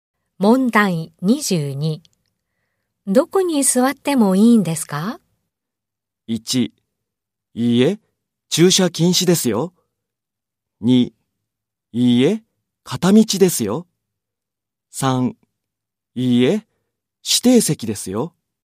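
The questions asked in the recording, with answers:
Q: どこに座ってもいいんですか?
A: 3: いいえ、指定席ですよ。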